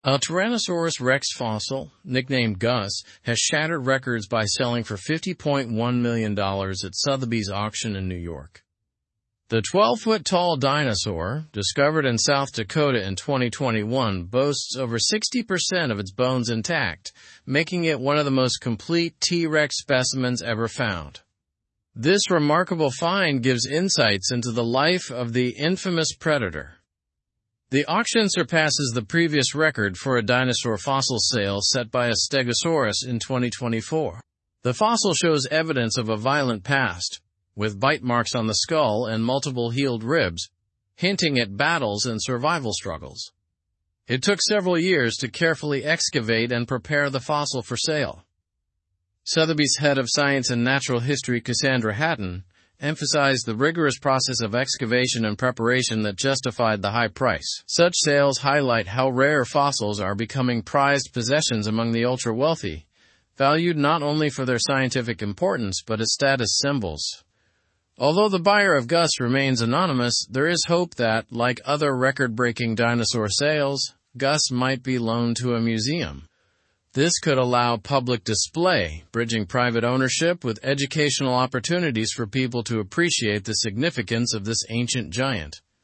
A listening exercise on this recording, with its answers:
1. Where did the auction for Gus take place?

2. What percentage of Gus's bones were intact?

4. What evidence does Gus's fossil show about its past?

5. Who is Cassandra Hatton?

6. What hope is mentioned regarding Gus after the sale?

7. Why are fossils valuable to the ultra-wealthy?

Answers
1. The auction took place at Sotheby's in New York.
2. Over 60% of Gus's bones were intact.
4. The fossil shows bite marks and healed ribs, suggesting a violent past.
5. Cassandra Hatton is Sotheby's head of science and natural history who emphasized the excavation process.
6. There is hope that Gus might be loaned to a museum for public display.
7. Fossils are valuable not only for their scientific importance but also as status symbols.

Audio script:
A Tyrannosaurus rex fossil, nicknamed Gus, has shattered records by selling for $50.1 million at Sotheby's auction in New York. The 12-foot-tall dinosaur, discovered in South Dakota in 2021, boasts over 60% of its bones intact, making it one of the most complete T. rex specimens ever found. This remarkable find gives insights into the life of the infamous predator.
The auction surpasses the previous record for a dinosaur fossil sale set by a stegosaurus in 2024. The fossil shows evidence of a violent past, with bite marks on the skull and multiple healed ribs, hinting at battles and survival struggles. It took several years to carefully excavate and prepare the fossil for sale.
Sotheby's head of science and natural history, Cassandra Hatton, emphasized the rigorous process of excavation and preparation that justified the high price. Such sales highlight how rare fossils are becoming prized possessions among the ultra-wealthy, valued not only for their scientific importance but as status symbols.
Although the buyer of Gus remains anonymous, there is hope that, like other record-breaking dinosaur sales, Gus might be loaned to a museum. This could allow public display, bridging private ownership with educational opportunities for people to appreciate the significance of this ancient giant.

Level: Level 3